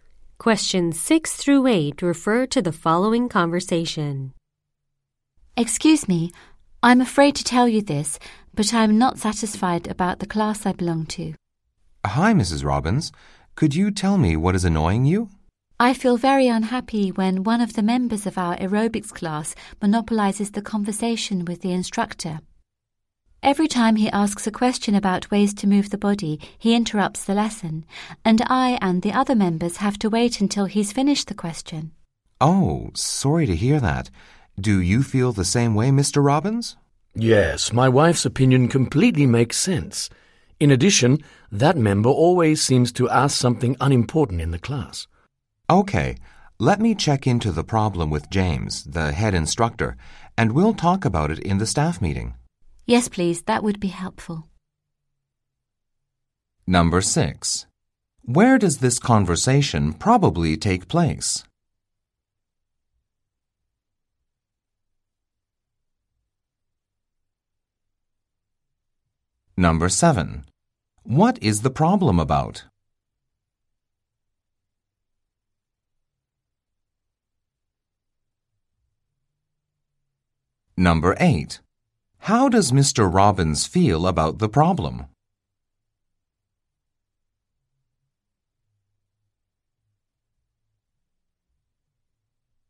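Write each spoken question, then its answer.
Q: Where does this conversation probably take place?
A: At a fitness center (gym) offering aerobics classes

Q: What is the problem about?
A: A class member monopolizes the instructor with questions and interrupts the lesson

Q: How does Mr. Robbins feel about the problem?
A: He agrees with his wife and is also unhappy about it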